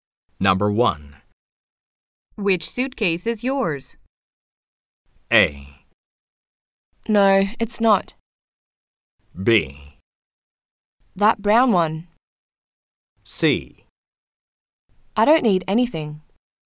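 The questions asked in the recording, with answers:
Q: Which suitcase is yours?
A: B: That brown one.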